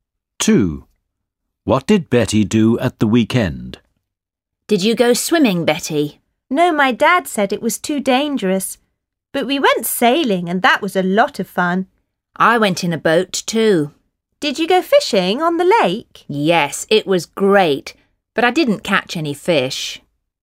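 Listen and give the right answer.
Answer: She went sailing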